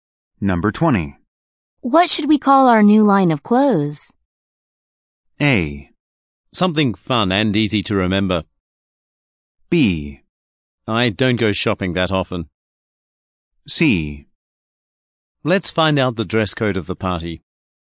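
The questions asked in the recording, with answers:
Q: What should we call our new line of clothes?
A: A: Something fun and easy to remember.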